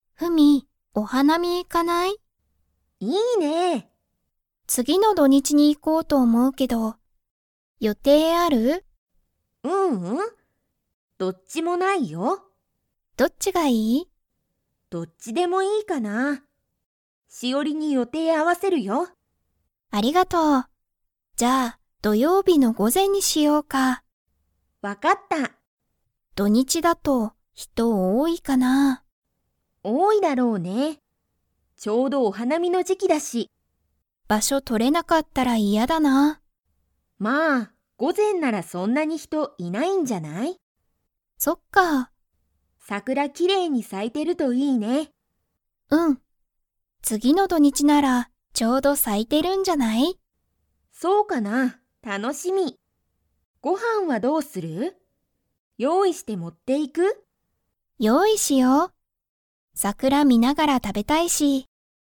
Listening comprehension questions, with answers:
Comprehension Quiz (Skip if you don't understand the conversation yet)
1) フミは、土日どにちに予定よていが 。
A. ある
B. ない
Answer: ない

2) 二人ふたりは、土曜日どようびに何なにを用意よういしますか?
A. 桜さくら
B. 写真しゃしん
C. ご飯はん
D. 本ほん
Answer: ご飯はん

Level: Level 4

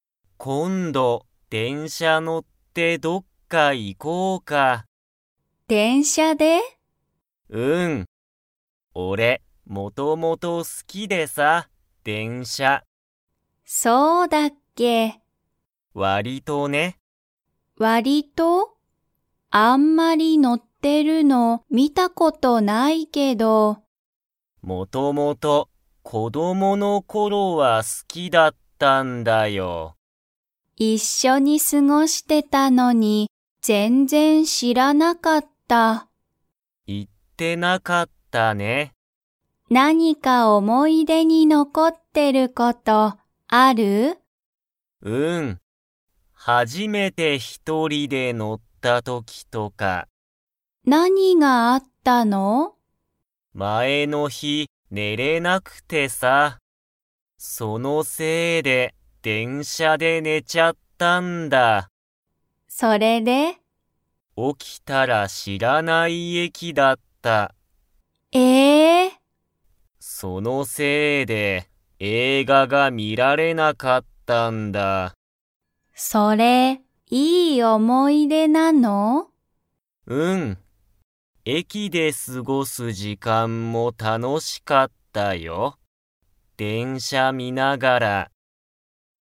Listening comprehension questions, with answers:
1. メグミは、ショウヘイが が好すきだと知しらなかった。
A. 電車でんしゃ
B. 駅えき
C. 映画えいが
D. 思おもい出で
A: 電車でんしゃ

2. ショウヘイは、一人ひとりで電車でんしゃに乗のったことがありますか?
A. はい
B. いいえ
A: はい

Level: Level 3

